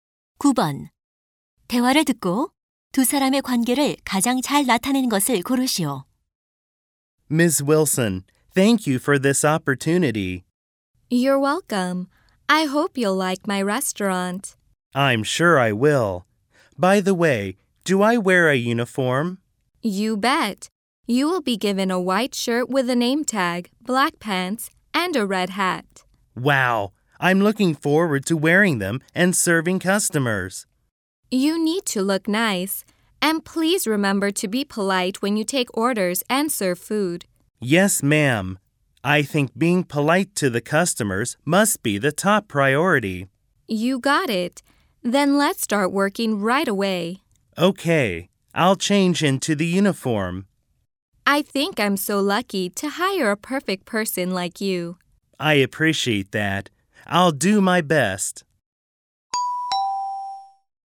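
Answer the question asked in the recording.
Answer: 식당 주인 - 신입 종업원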